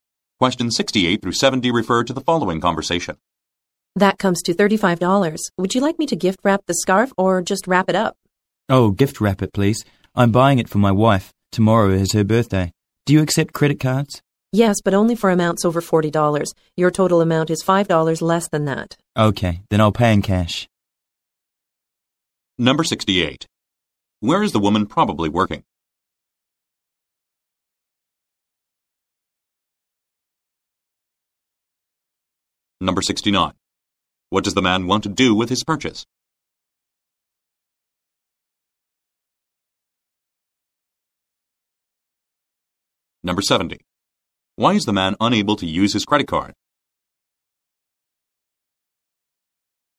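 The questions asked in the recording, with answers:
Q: What does the man want to do with his purchase?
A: Have it gift wrapped

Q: Why is the man unable to use his credit card?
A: His total is under $40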